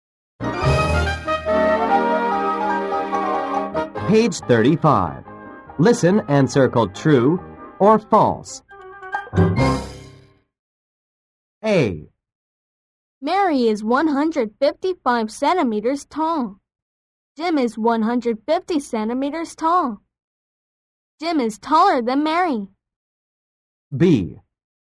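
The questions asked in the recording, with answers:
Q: Jim is taller than Mary.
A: False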